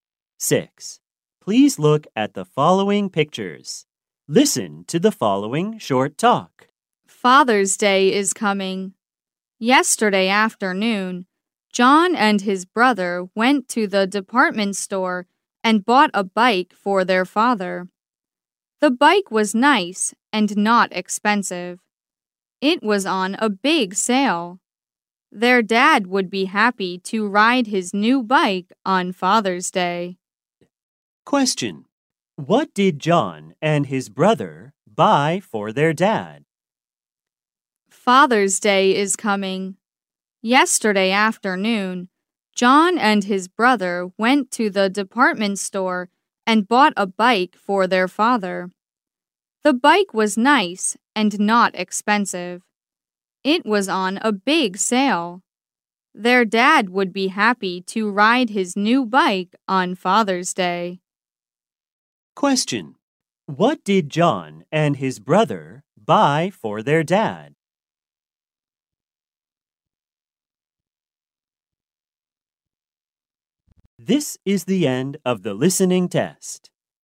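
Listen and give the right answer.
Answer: A bike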